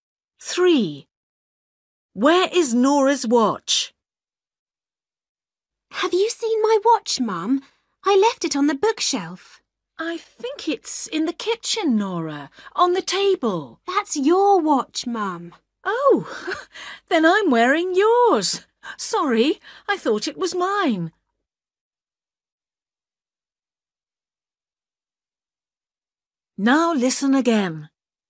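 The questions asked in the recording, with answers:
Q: Where is Nora's watch?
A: Her mum is wearing it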